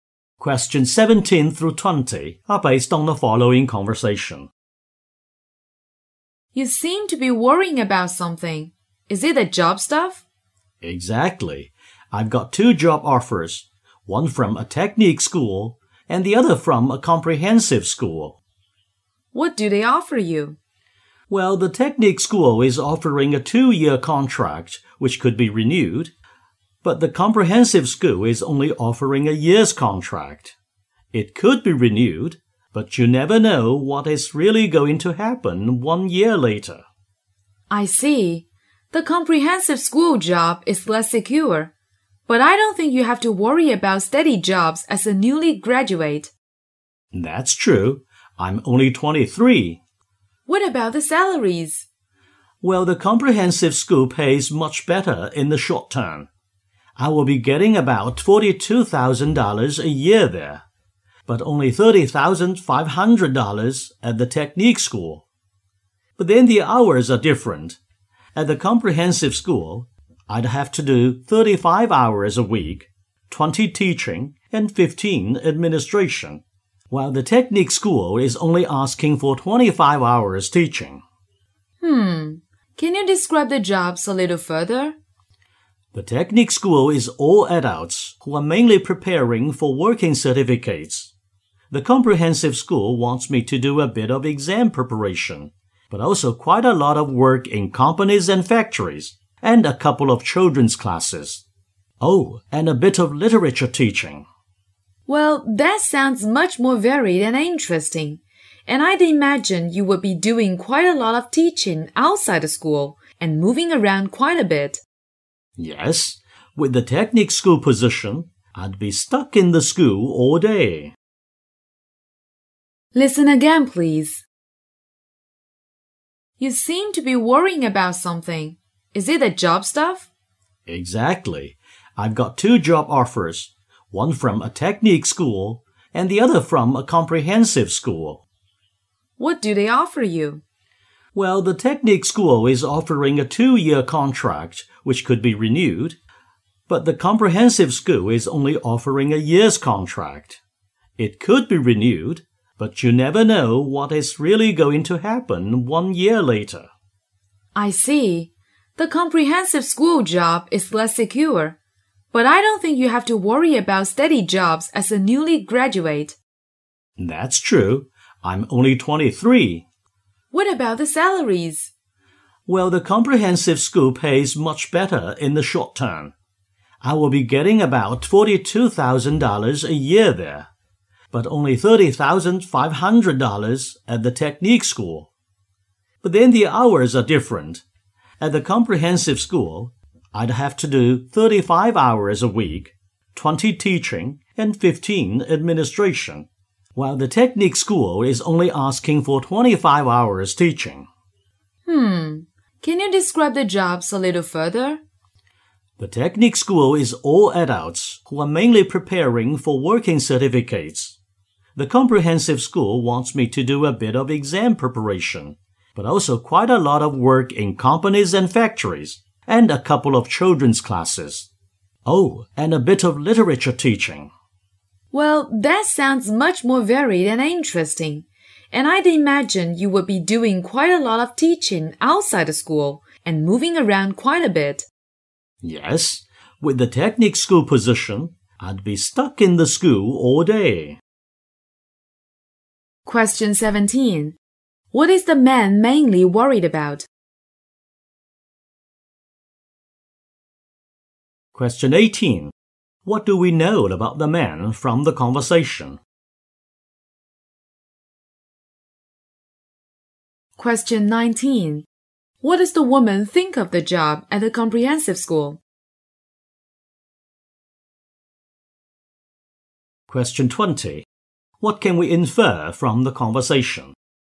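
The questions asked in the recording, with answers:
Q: What is the man mainly worried about?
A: Which of two job offers to accept

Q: What do we know about the man from the conversation?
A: He is a 23-year-old new graduate

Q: What does the woman think of the job at the comprehensive school?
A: It is more varied and interesting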